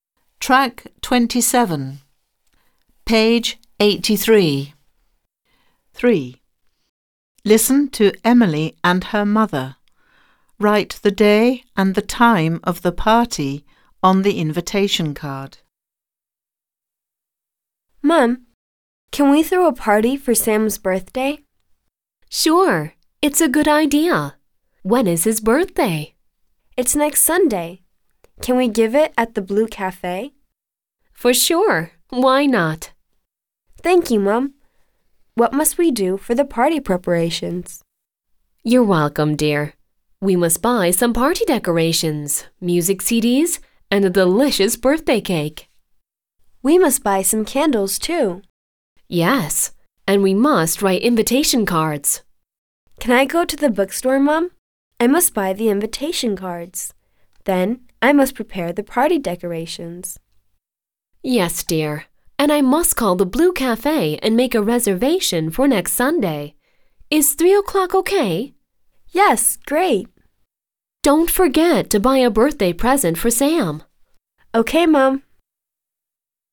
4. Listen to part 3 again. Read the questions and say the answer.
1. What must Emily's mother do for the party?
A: She must call the Blue Cafe to make reservation.

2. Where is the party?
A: Party at the Blue Cafe.

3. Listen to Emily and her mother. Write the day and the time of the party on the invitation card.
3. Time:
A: 3 O'clock.

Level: 5. Sınıf